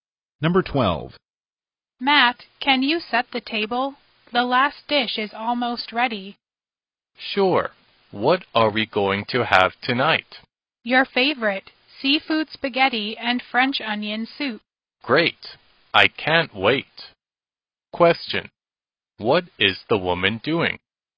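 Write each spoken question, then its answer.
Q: What is the woman doing?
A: Cooking dinner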